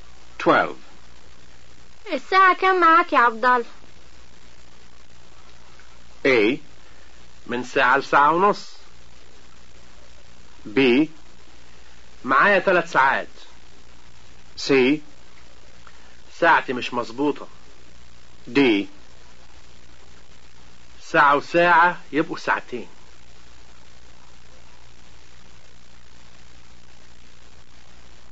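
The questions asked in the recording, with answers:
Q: الساعة كم معاك يا عبدال؟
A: C: ساعتي مش مظبوطة.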